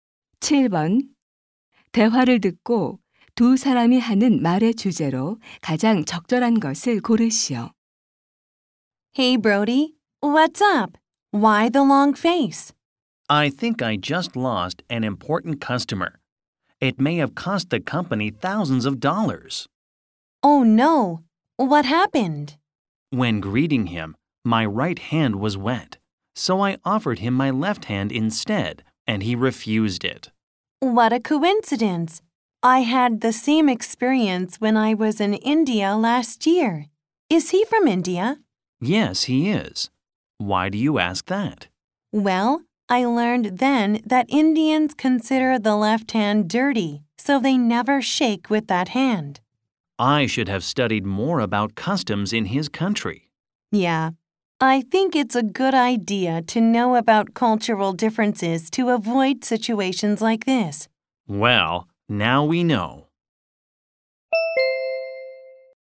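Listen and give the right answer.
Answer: 문화적 차이를 아는 것의 중요성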